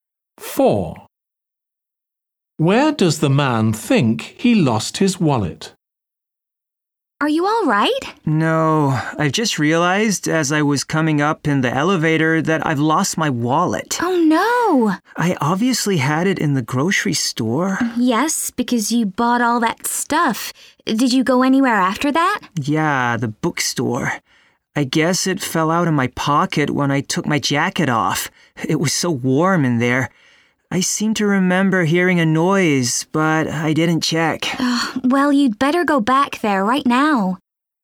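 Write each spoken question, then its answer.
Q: Where does the man think he lost his wallet?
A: in the bookstore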